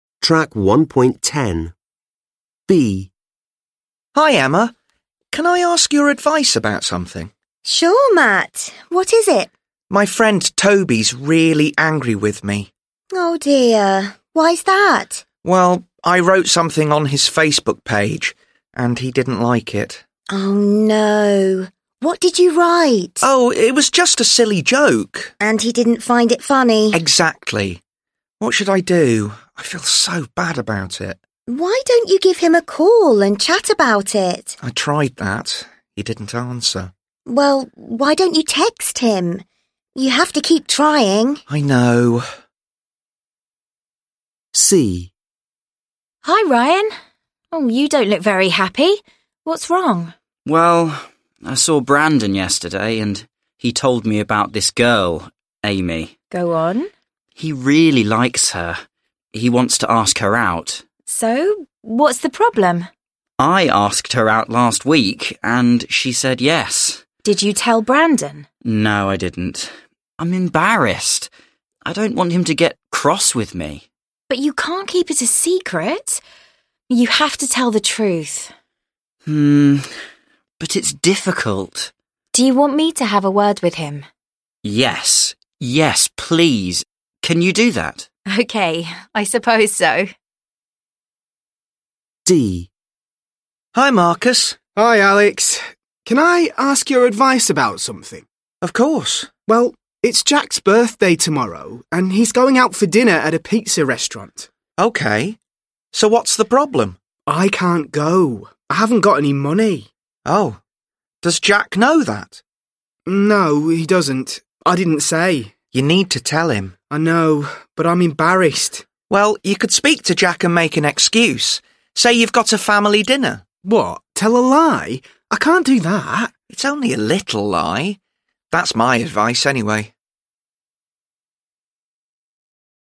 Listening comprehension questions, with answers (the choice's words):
Listen again to dialogues B, C and D. Complete the collocations (1-6) with the verbs below.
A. find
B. make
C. give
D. tell x2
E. have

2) _______ sombody a call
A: give

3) _______ the truth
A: tell x2

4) _______ a word (with sombody)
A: have

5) _______ an excuse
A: make

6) _______ a lie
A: tell x2

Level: Lớp 10